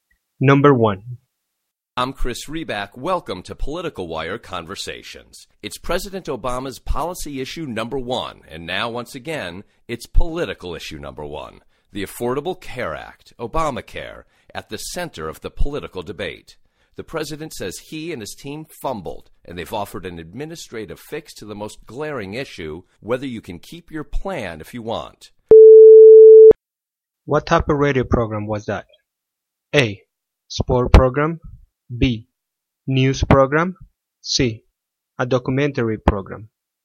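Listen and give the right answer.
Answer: B: News program.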